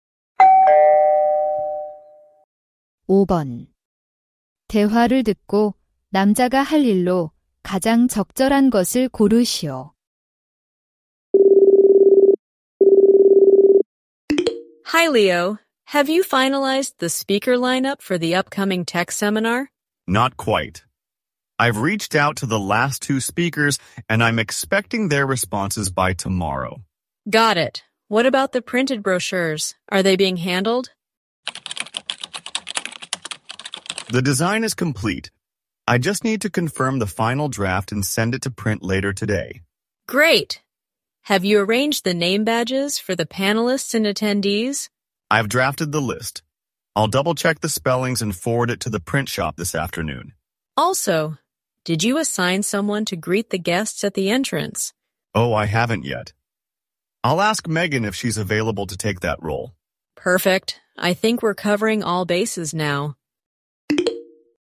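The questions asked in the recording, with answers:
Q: 대화를 듣고 남자가 할 일로 가장 적절한 것을 고르시오.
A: Megan에게 손님 안내 역할을 부탁하기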